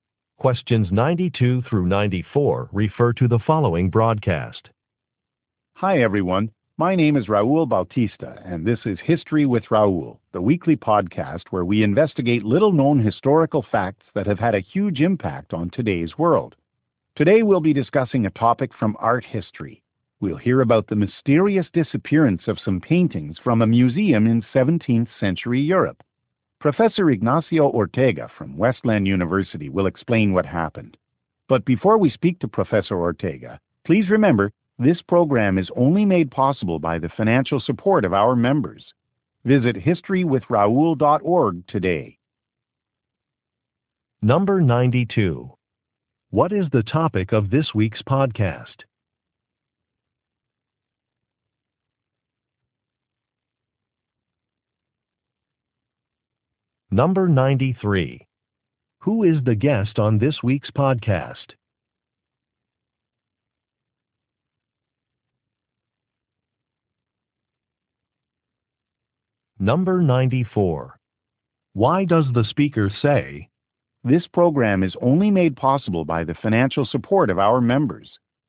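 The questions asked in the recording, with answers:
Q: What is the topic of this week's podcast?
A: The disappearance of paintings from a 17th-century European museum

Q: Who is the guest on this week's podcast?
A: A university professor, Ignacio Ortega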